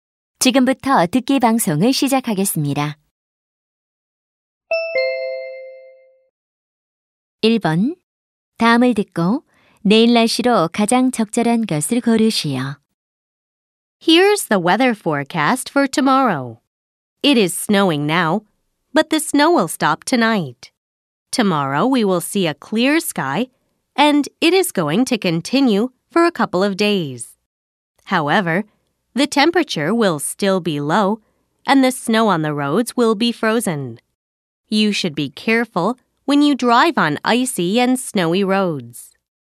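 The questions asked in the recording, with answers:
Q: 다음을 듣고 내일 날씨로 가장 적절한 것을 고르시오.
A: 맑음 (추움)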